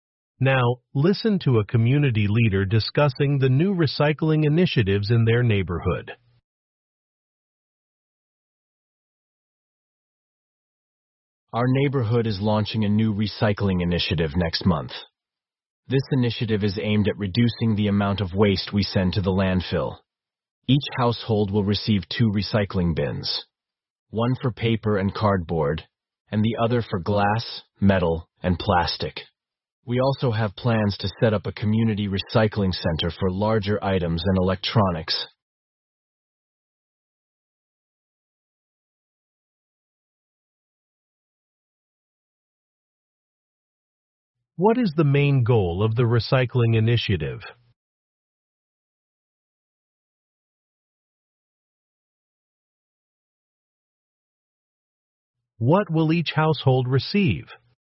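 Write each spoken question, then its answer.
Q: What is the main goal of the recycling initiative?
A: To reduce the amount of waste sent to the landfill

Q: What will each household receive?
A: Two recycling bins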